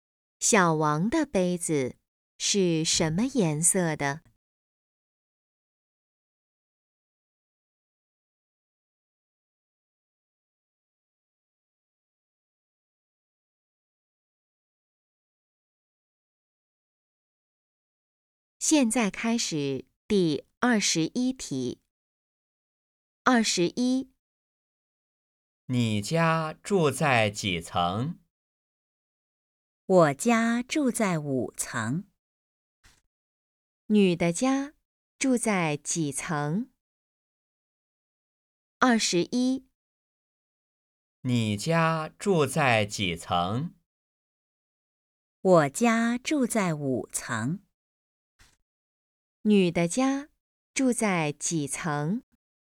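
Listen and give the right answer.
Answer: 五层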